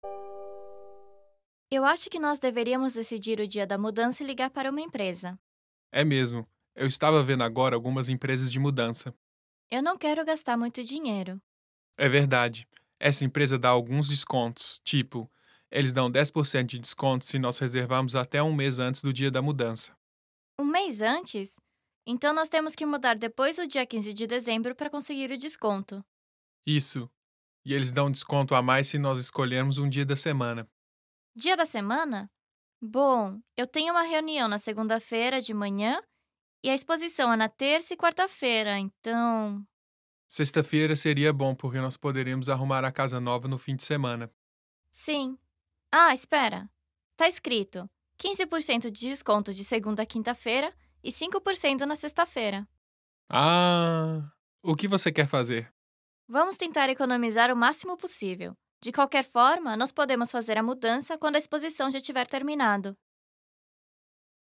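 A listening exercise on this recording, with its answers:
Escute o áudio e escolha a afirmação verdadeira ou falsa.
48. Declaração: O locutor quer agendar a mudança para sexta-feira para receber um desconto de 15%.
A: falsa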